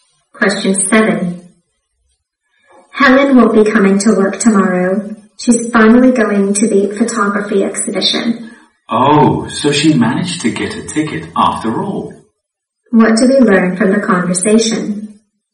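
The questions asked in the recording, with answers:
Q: What do we learn from the conversation?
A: Helen got a ticket to the photography exhibition.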